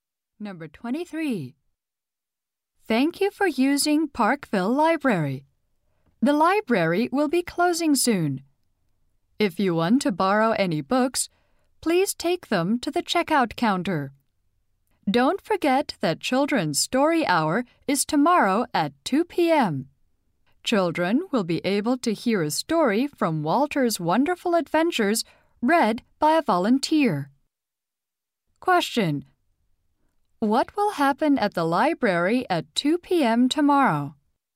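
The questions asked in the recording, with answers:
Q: What will happen at the library at 2 p.m.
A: Children's Story Hour: a volunteer will read a story.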